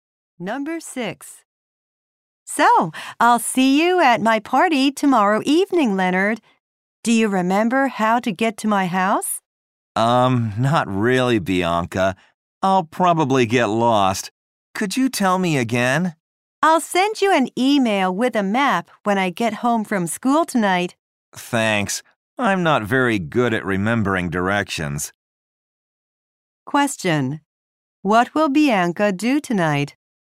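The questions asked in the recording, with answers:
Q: What will Bianca do tonight?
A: Send Leonard an email with a map.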